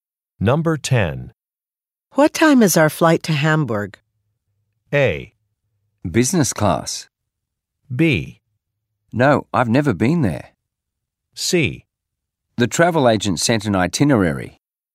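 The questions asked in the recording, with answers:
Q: What time is our flight to Hamburg?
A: C: The travel agent sent an itinerary.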